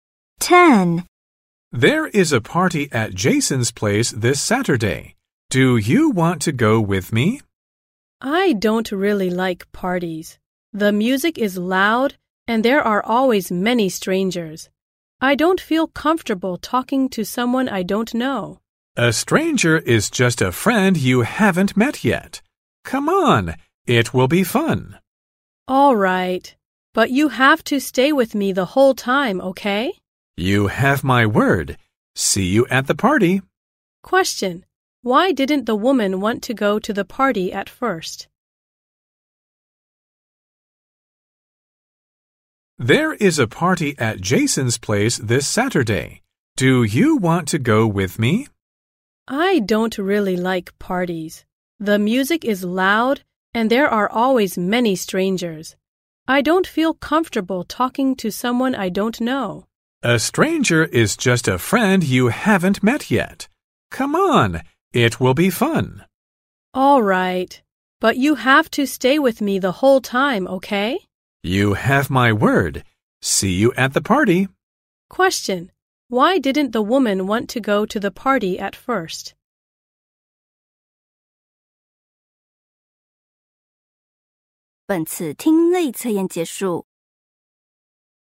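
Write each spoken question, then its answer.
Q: Why didn't the woman want to go to the party at first?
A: She doesn't feel comfortable talking to strangers (loud music, many strangers).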